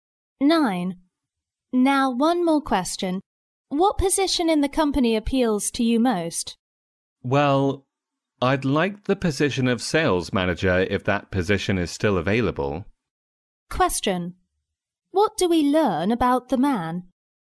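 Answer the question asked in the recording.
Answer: He is applying for the sales manager position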